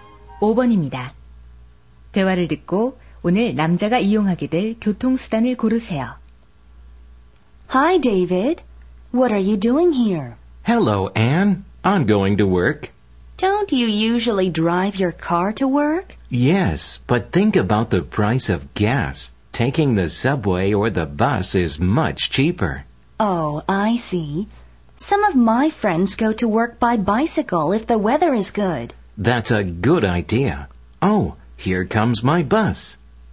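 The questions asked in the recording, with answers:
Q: 대화를 듣고 오늘 남자가 이용하게 될 교통수단을 고르세요.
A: 버스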